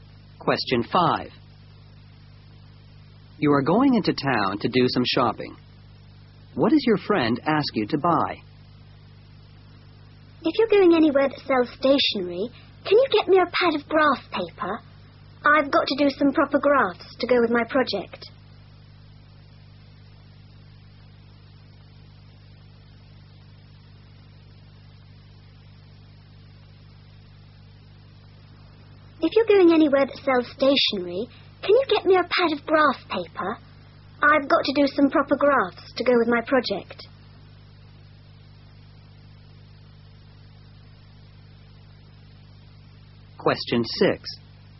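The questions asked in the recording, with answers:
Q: What does your friend ask you to buy?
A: A pad of graph paper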